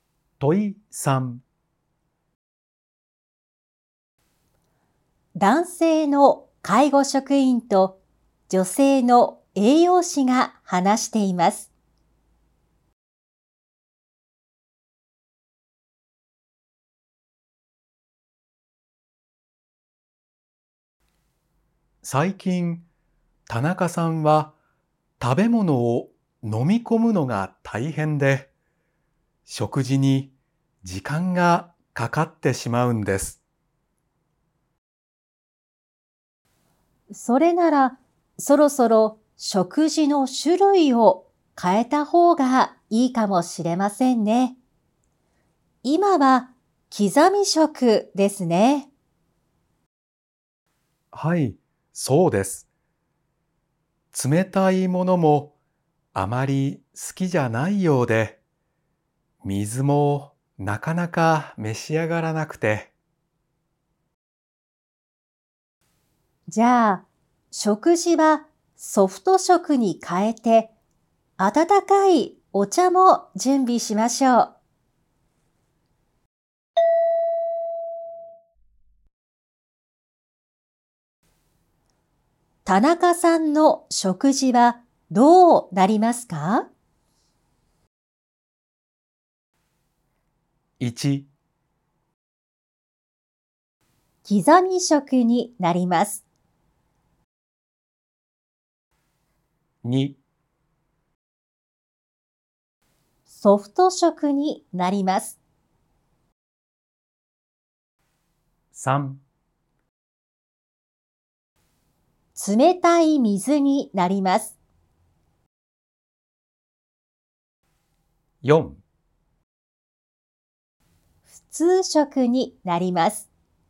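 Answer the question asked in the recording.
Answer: 2: ソフト食になります。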